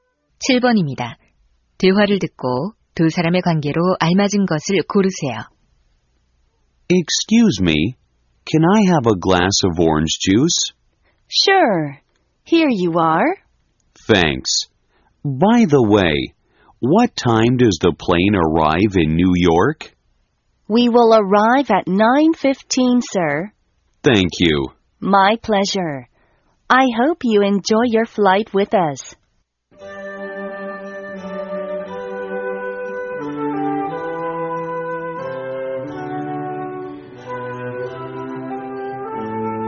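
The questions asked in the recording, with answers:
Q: 대화를 듣고 두 사람의 관계로 알맞은 것을 고르세요.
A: 승무원과 승객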